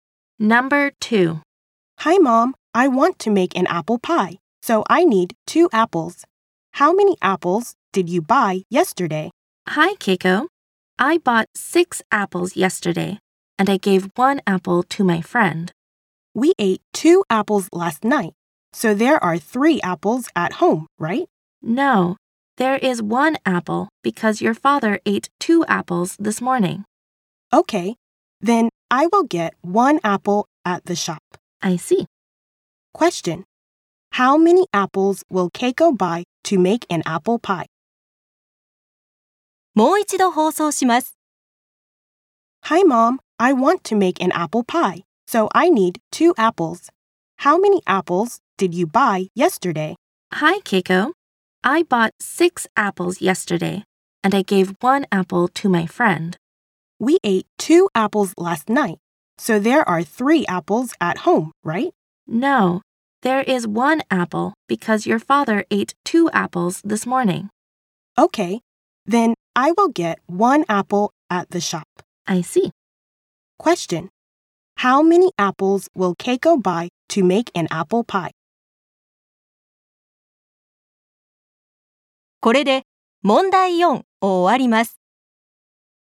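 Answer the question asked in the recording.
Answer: One apple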